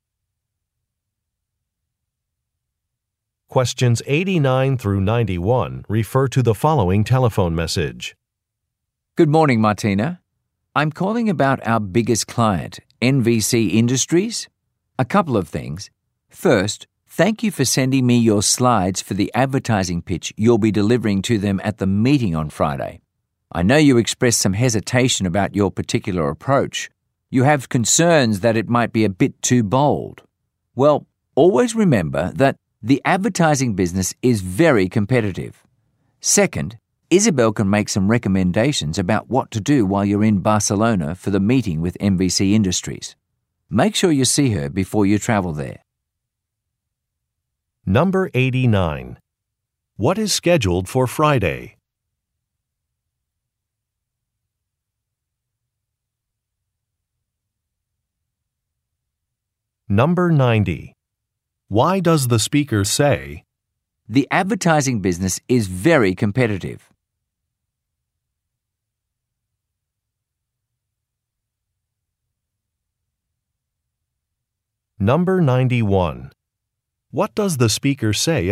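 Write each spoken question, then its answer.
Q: What is scheduled for Friday?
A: A meeting where Martina will deliver an advertising pitch to NVC Industries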